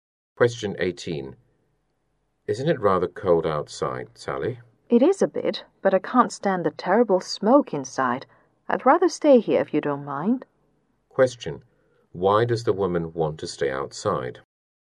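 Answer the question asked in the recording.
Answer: She can't stand the smoke inside.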